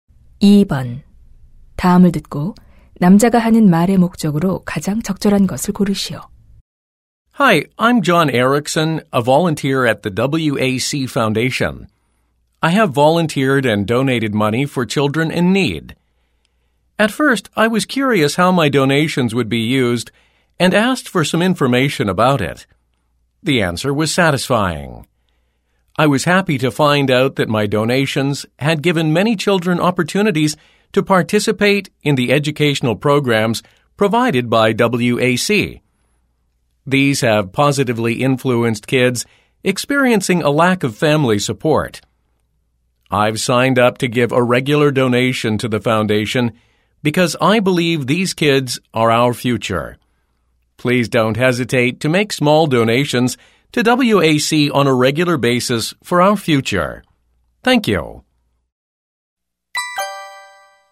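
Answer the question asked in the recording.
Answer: WAC 재단에 정기 기부를 권장하려고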